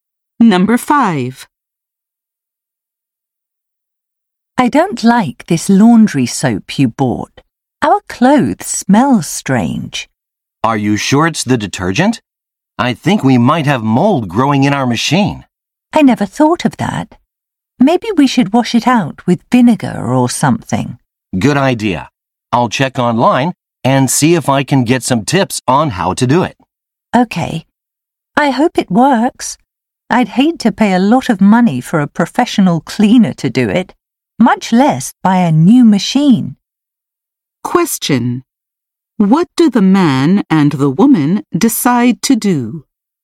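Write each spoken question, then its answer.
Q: What do the man and the woman decide to do?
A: Clean the washing machine themselves, for example with vinegar.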